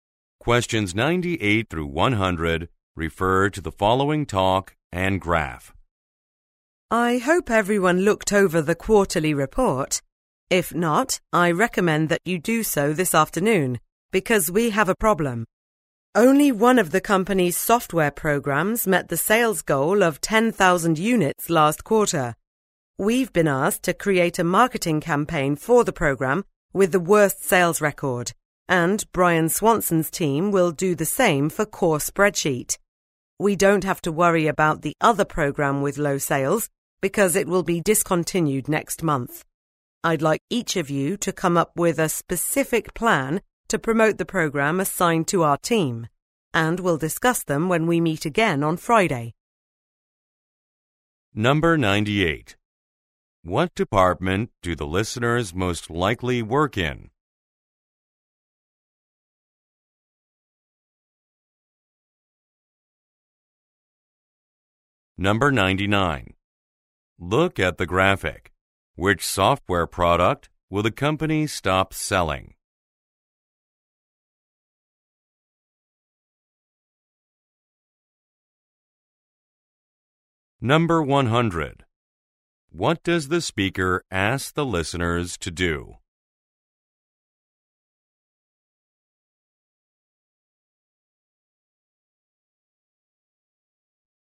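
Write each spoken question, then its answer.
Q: What department do the listeners most likely work in?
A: Marketing

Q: What does the speaker ask the listeners to do?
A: Come up with a specific plan to promote the team's assigned program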